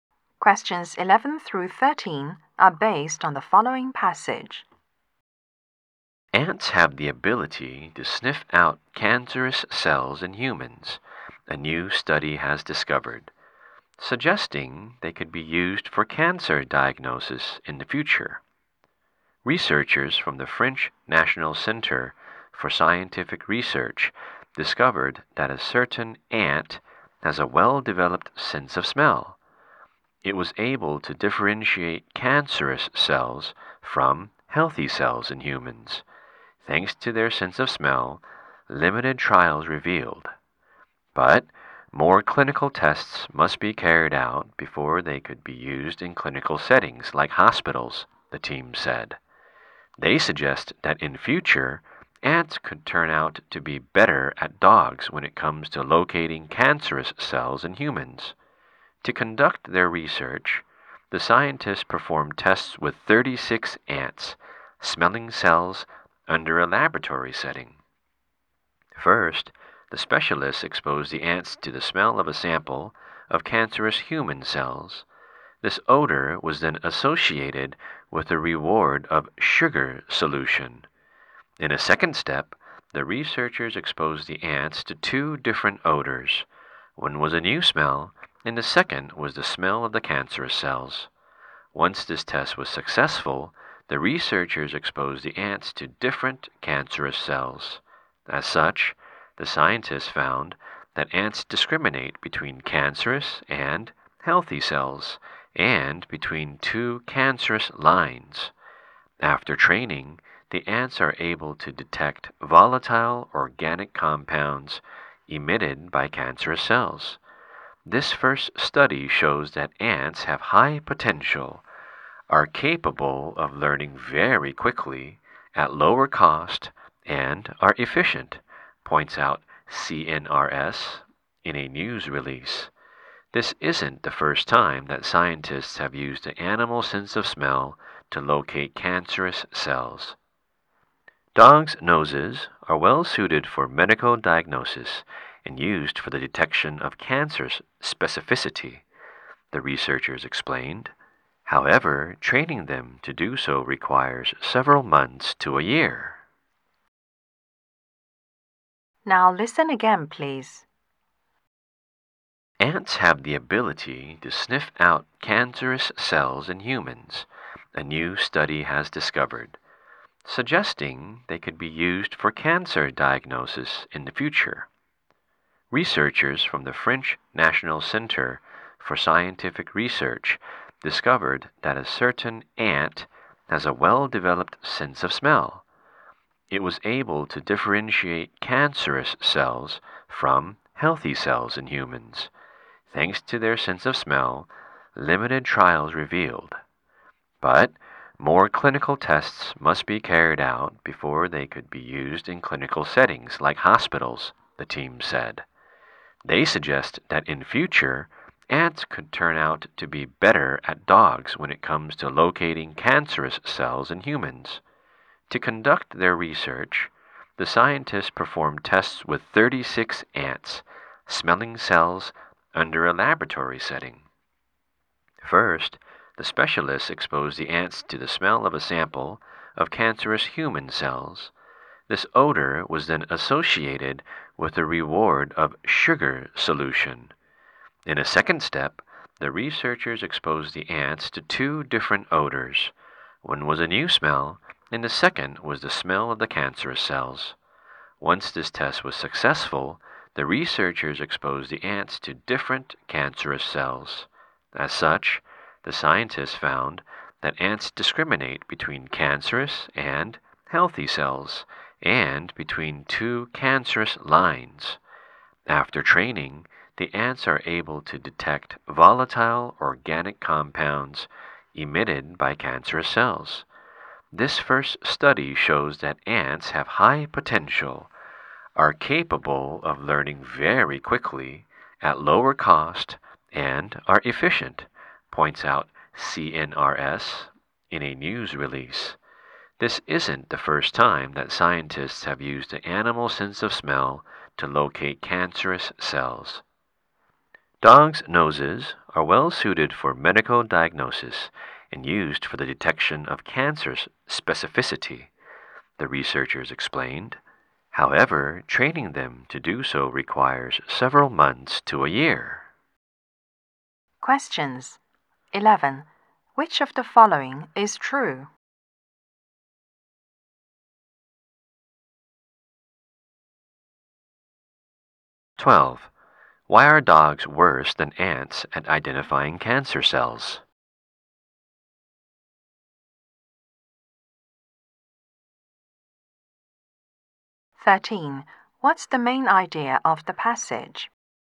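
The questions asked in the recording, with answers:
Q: Why are dogs worse than ants at identifying cancer cells?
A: Training dogs takes several months to a year

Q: What's the main idea of the passage?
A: Ants can be trained to sniff out cancer cells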